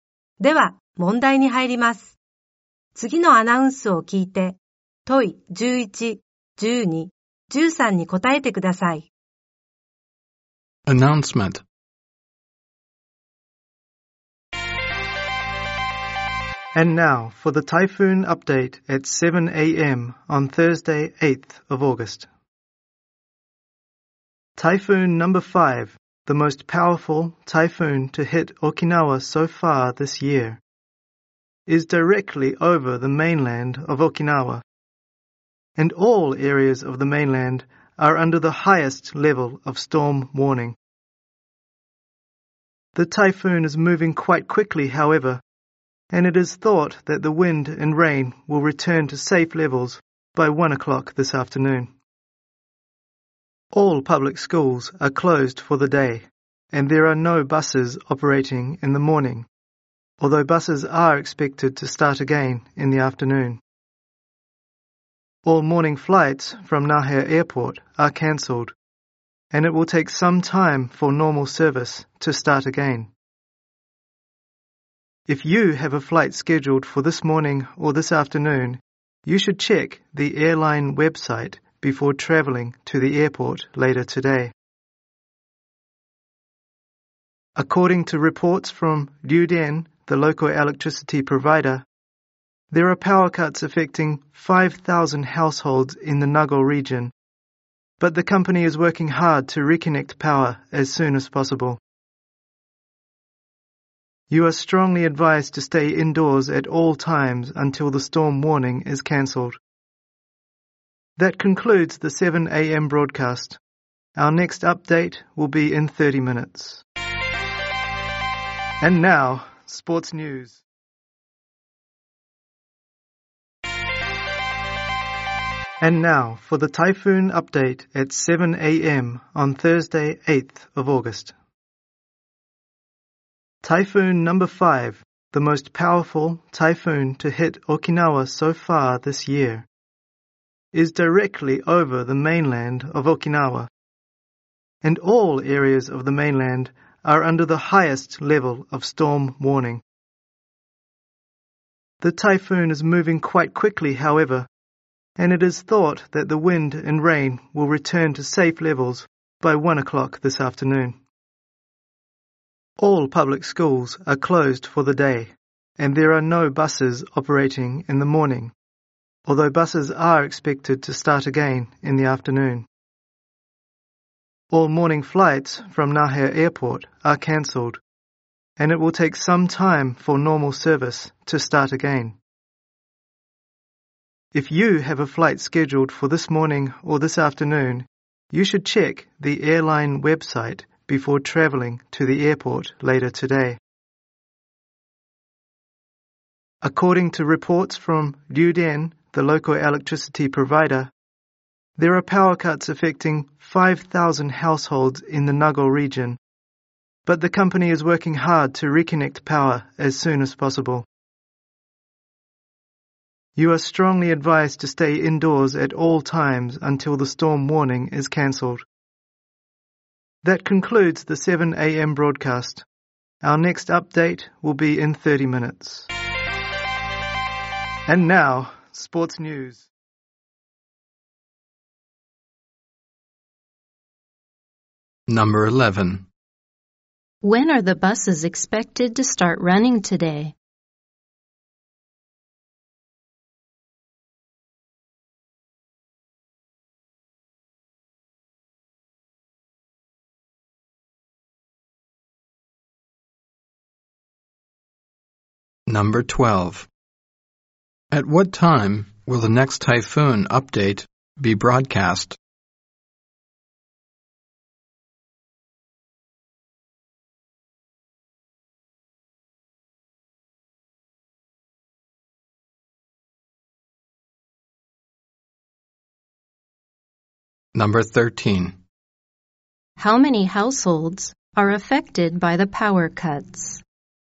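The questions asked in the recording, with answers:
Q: When are the buses expected to start running today?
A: In the afternoon

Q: At what time will the next typhoon update be broadcast?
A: At 7:30 a.m.

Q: How many households are affected by the power cuts?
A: 5,000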